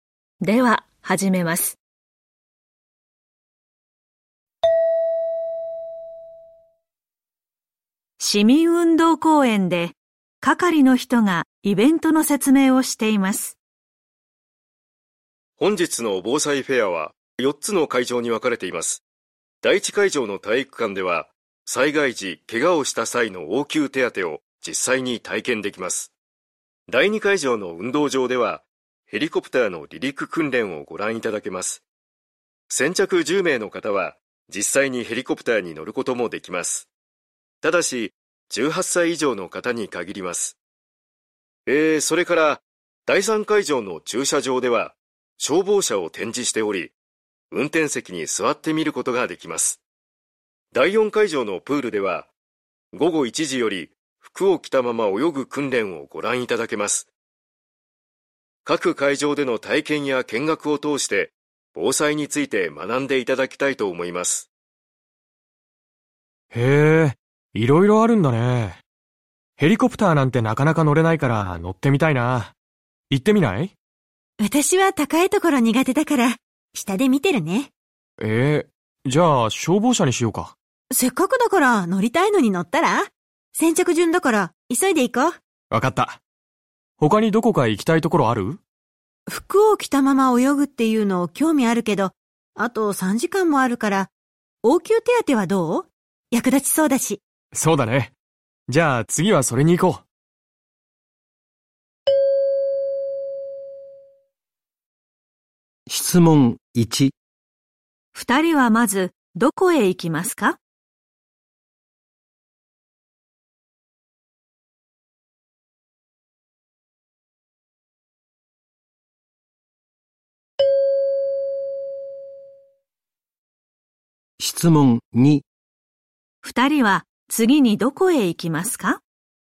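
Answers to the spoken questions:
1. 第二会場の運動場(ヘリコプター)
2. 第一会場の体育館(応急手当)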